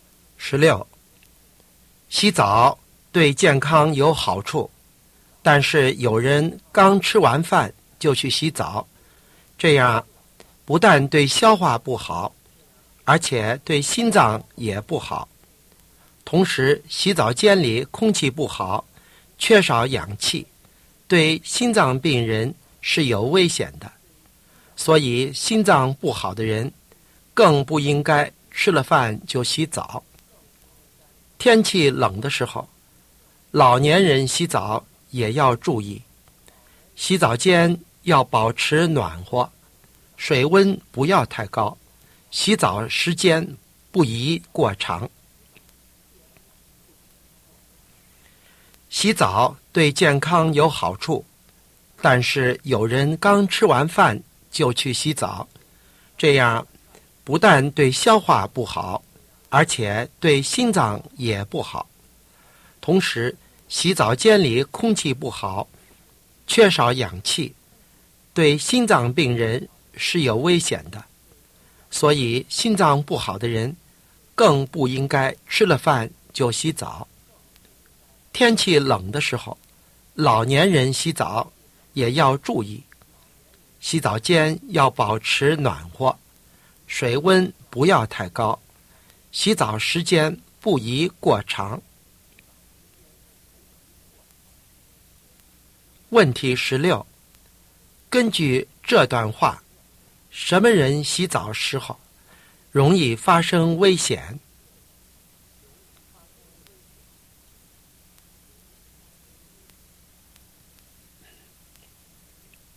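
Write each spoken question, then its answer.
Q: 根据这段话,什么人洗澡时候容易发生危险?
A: 心脏病人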